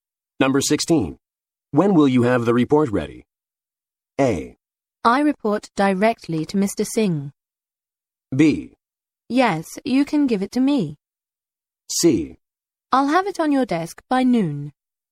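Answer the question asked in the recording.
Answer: C: I'll have it on your desk by noon.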